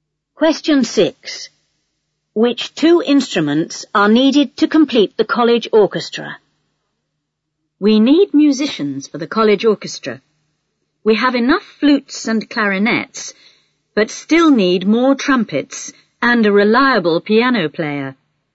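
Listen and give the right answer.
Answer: Trumpets and piano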